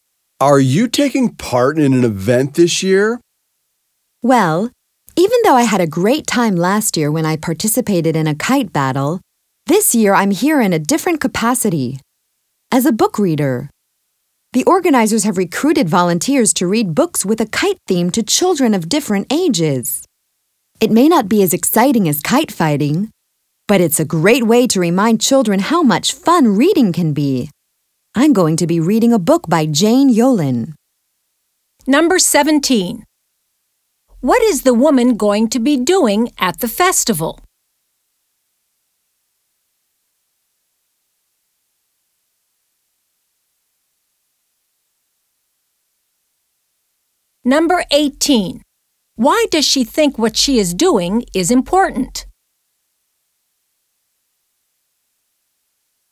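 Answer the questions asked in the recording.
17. Reading kite-themed books to children
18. It reminds children how much fun reading can be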